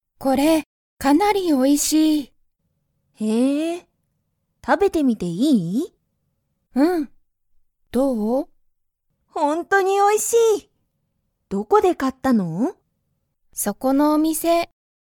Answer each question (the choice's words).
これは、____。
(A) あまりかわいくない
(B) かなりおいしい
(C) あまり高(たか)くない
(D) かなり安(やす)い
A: かなりおいしい

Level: Level 1